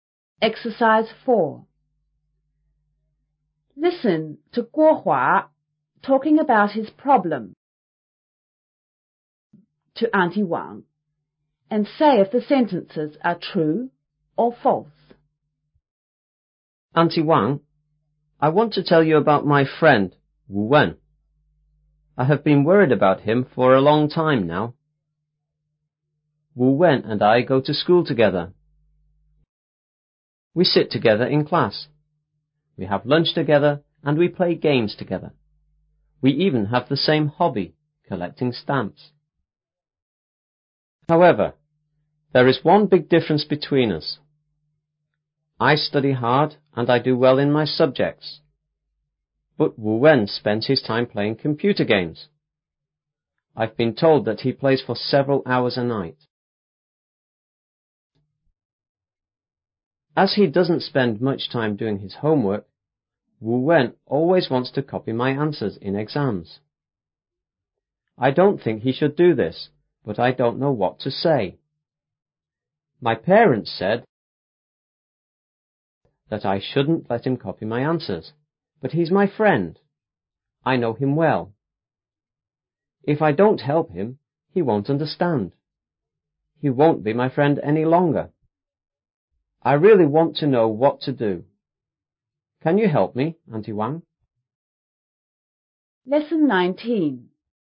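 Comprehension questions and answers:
to Auntie Wang and say if the sentences are true (T) or false (F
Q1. Wu Wen and Guo Hua are classmates.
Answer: T

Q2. Neither Wu Wen nor Guo Hua plays computer games.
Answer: F

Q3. Wu Wen is good at most subjects.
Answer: F

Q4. Guo Hua wants to let Wu Wen copy his answers.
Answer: F

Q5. Guo Hua doesn't want to lose his friend.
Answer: T

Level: 初中英语广州版5B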